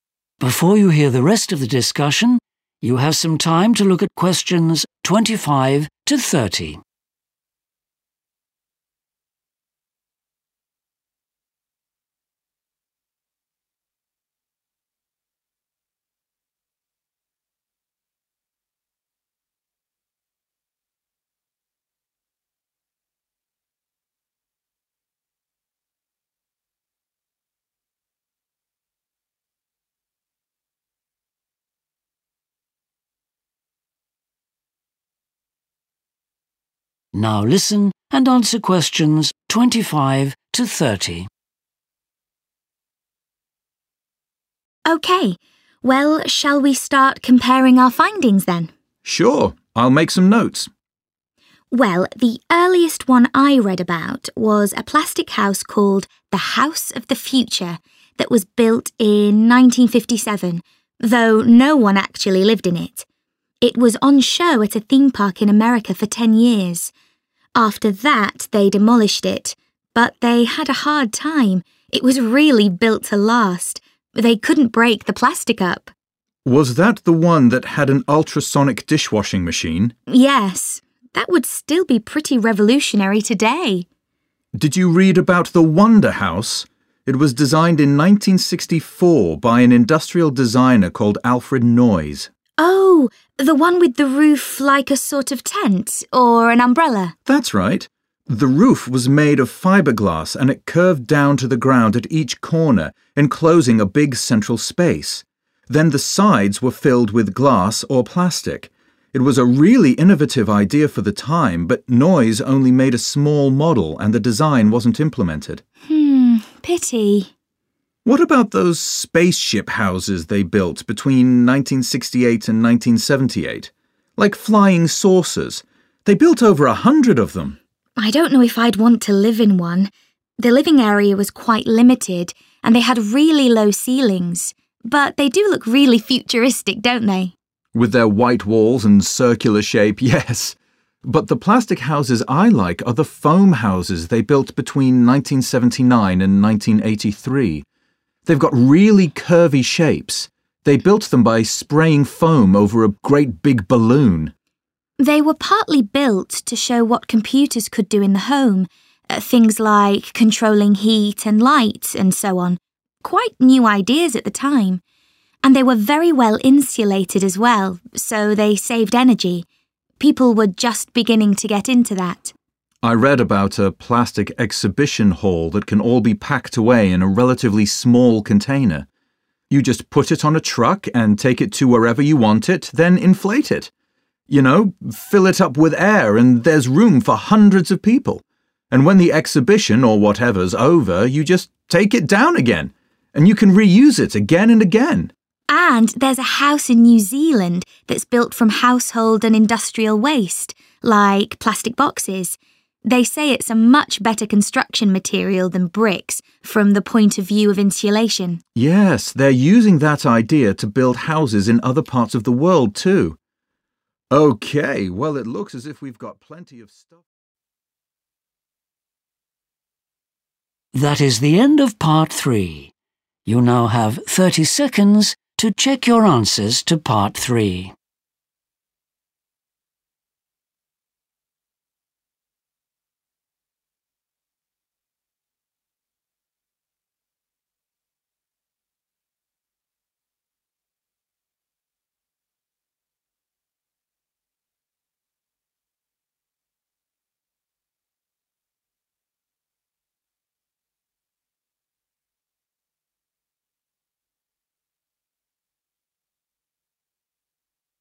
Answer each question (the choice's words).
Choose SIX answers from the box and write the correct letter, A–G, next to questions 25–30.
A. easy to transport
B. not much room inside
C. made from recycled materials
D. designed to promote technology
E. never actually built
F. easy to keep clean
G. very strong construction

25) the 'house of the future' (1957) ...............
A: very strong construction

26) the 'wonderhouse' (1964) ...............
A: never actually built

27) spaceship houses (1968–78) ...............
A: not much room inside

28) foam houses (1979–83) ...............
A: designed to promote technology

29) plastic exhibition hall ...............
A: easy to transport

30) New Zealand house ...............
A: made from recycled materials